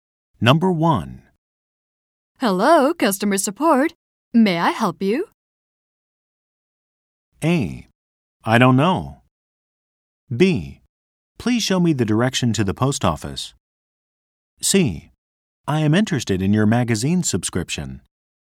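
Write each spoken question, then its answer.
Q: Hello, customer support. May I help you?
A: C: I am interested in your magazine subscription.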